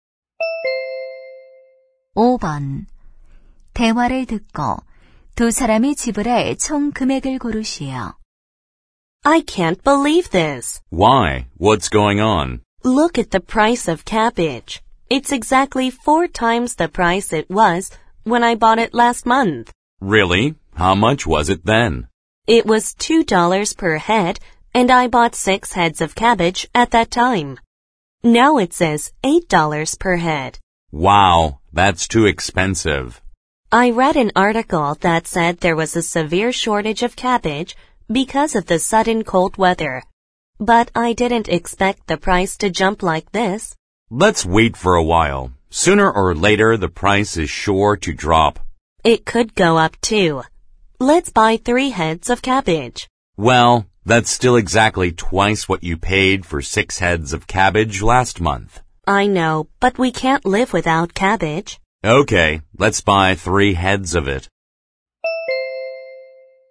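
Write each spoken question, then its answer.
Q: 대화를 듣고 두 사람이 지불할 총 금액을 고르시오.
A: 24달러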